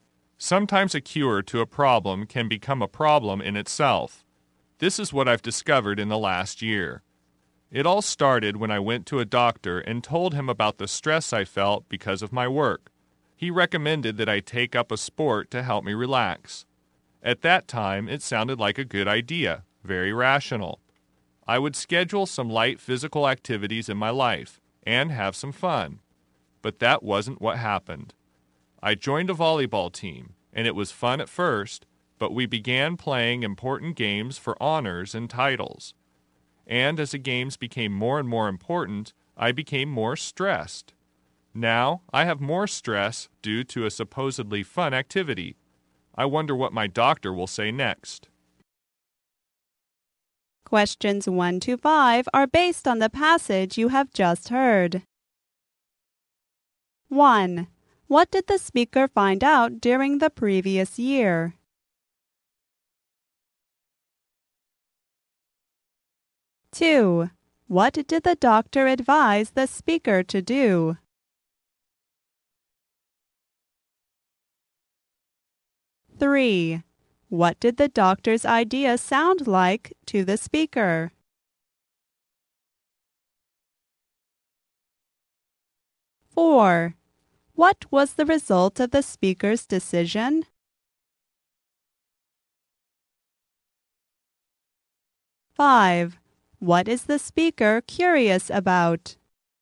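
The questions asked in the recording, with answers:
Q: What did the speaker find out during the previous year?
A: A cure to a problem can become a problem itself.

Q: What did the doctor advise the speaker to do?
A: Take up a sport to relax.

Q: What did the doctor's idea sound like to the speaker?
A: A good, rational idea.

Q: What was the result of the speaker's decision?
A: He became more stressed.

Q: What is the speaker curious about?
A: What his doctor will say next.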